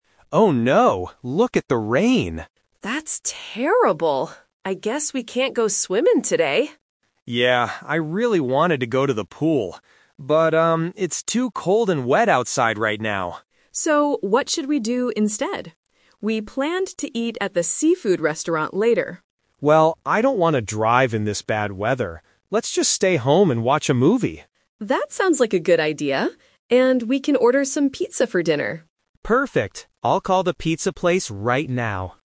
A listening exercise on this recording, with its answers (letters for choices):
Listen to the conversation between a couple and choose the correct answer (A, B, or C) for each question.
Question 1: What are they going to do today?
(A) Go swimming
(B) Watch a movie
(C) Go shopping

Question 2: Why did they change their plan?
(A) Because they are tired.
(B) Because the pool is closed.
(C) Because it is raining.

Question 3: What will they have for dinner?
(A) Seafood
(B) Pizza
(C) Hamburgers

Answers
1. B
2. C
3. B

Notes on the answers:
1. The man says he wanted to go to the pool to go swimming (The Trap). However, they change their plan because of the weather. The man suggests the final plan: "Let's just stay home and watch a movie." Going shopping is not mentioned in the audio.
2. In the first line, the man says, "look at the rain!" and later explains it is "too cold and wet outside." Option A (tired) and Option B (pool is closed) are plausible reasons, but they are not mentioned by the speakers.
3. The woman mentions that they planned to eat at the seafood restaurant (The Trap). But the man doesn't want to go out. The woman uses "And" to add to their stay-home plan: "we can order some pizza for dinner." Hamburgers are not mentioned.

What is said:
Man: Oh no, look at the rain!
Woman: That's terrible. I guess we can't go swimming today.
Man: Yeah, I really wanted to go to the pool. But, um, it's too cold and wet outside right now.
Woman: So, what should we do instead? We planned to eat at the seafood restaurant later.
Man: Well, I don't want to drive in this bad weather. Let's just stay home and watch a movie.
Woman: That sounds like a good idea. And we can order some pizza for dinner.